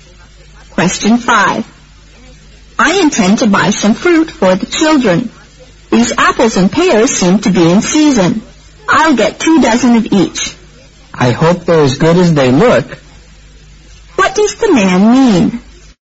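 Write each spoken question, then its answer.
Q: What does the man mean?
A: He will buy two dozen apples and two dozen pears for the children.

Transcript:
I intend to buy some fruit for the children. These apples and pears seem to be in season. I'll get 2 dozen of each.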